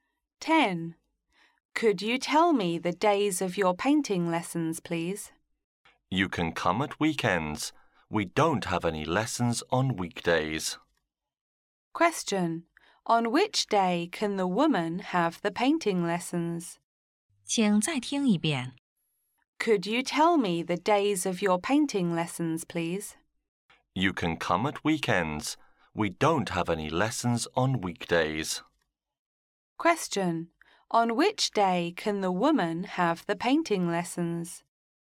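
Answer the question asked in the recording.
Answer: At weekends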